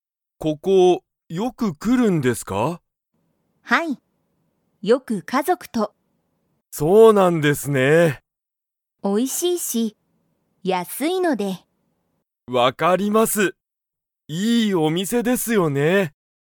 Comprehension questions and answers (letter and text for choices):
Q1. 松井まついさんは、ここに家族かぞくとよく来きますか?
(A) はい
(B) いいえ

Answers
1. (A) はい